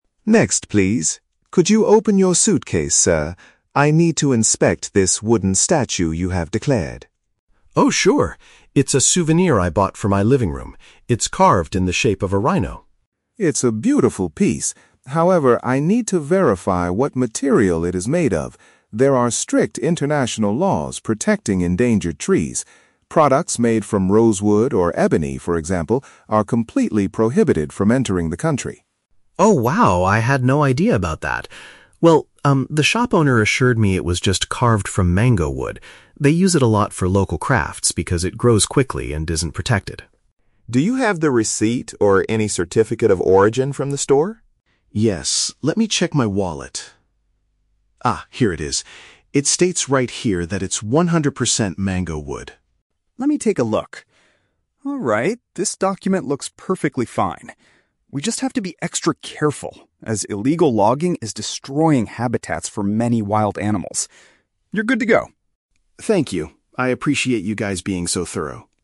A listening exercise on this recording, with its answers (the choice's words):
Listen to a conversation between a customs officer and a passenger at the airport. Choose the best answer (A, B, or C) for each question.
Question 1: Why is the customs officer inspecting the passenger's souvenir?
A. To confirm it is not produced from forbidden plant species.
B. To check if it is carved out of a real rhino horn.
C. To determine its exact price in order to charge an import tax.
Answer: To confirm it is not produced from forbidden plant species.

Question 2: How does the passenger prove that his item is legal?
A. He asks the shop owner to speak directly to the officer.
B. He presents a document he received when purchasing the item.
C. He points out the official brand name carved on the bottom.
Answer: He presents a document he received when purchasing the item.

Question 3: According to the officer, what is a major consequence of illegal logging?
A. It reduces the number of fast-growing trees like the mango tree.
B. It significantly contributes to the worsening of global climate change.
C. It ruins the natural environments where wildlife lives.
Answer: It ruins the natural environments where wildlife lives.

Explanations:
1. The officer needs to "verify what material it is made of" because products from "endangered trees" are "prohibited." Option A uses synonyms: "forbidden plant species" is a paraphrase for prohibited/endangered trees.
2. The officer asks for a "receipt or any certificate of origin," and the passenger provides it ("this document looks perfectly fine"). Option B paraphrases this as presenting "a document he received when purchasing."
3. The officer states that illegal logging is "destroying habitats for many wild animals." Option C paraphrases this as "ruins the natural environments where wildlife lives."

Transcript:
Customs Officer: Next, please. Could you open your suitcase, sir? I need to inspect this wooden statue you have declared.
Passenger: Oh, sure. It's a souvenir I bought for my living room. It's carved in the shape of a rhino.
Customs Officer: It's a beautiful piece. However, I need to verify what material it is made of. There are strict international laws protecting endangered trees. Products made from rosewood or ebony, for example, are completely prohibited from entering the country.
Passenger: Oh, wow, I had no idea about that. Well, um, the shop owner assured me it was just carved from mango wood. They use it a lot for local crafts because it grows quickly and isn't protected.
Customs Officer: Do you have the receipt or any certificate of origin from the store?
Passenger: Yes, let me check my wallet. Ah, here it is. It states right here that it's one hundred percent mango wood.
Customs Officer: Let me take a look. Alright, this document looks perfectly fine. We just have to be extra careful, as illegal logging is destroying habitats for many wild animals. You're good to go.